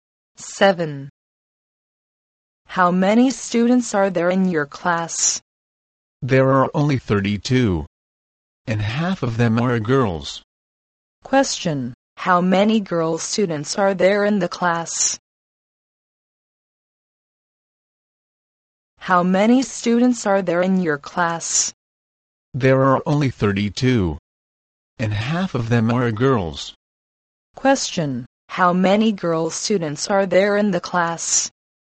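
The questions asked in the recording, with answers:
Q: How many girl students are there in the class?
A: 16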